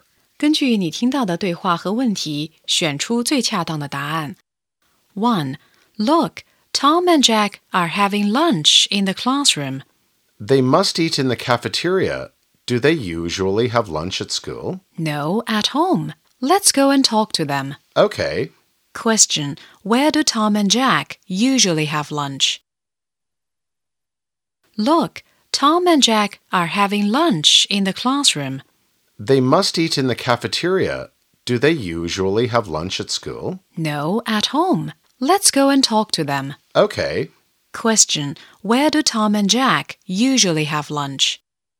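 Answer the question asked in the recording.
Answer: At home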